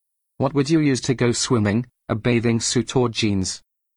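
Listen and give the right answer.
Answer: A bathing suit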